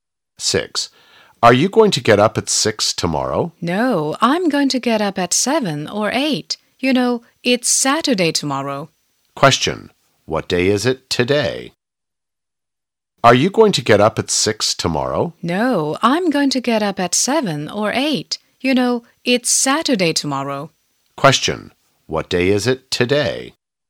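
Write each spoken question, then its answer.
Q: What day is it today?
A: Friday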